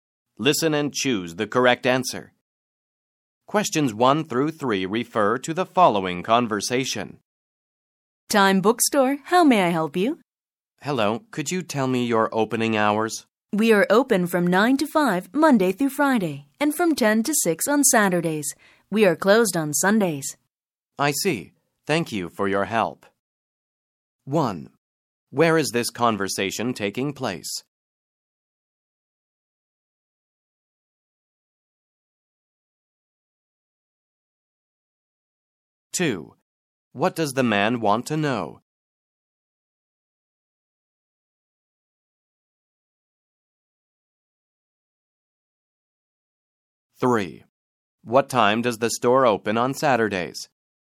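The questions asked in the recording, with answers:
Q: What does the man want to know?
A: The store's opening hours

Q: What time does the store open on Saturdays?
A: At 10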